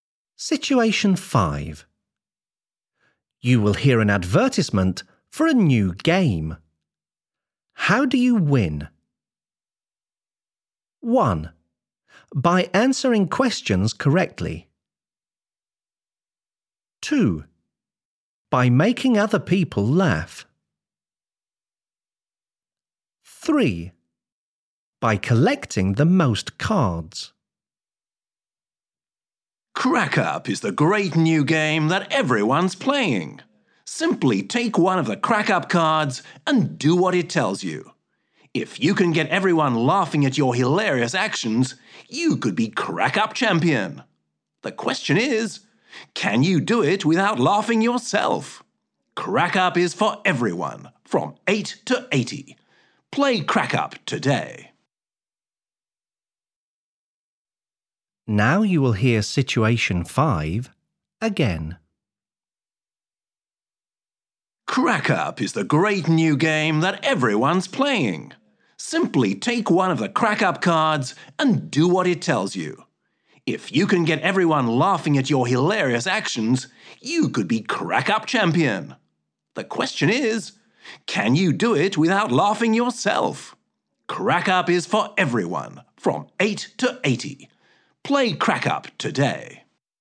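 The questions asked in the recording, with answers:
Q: How do you win?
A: 2: By making other people laugh.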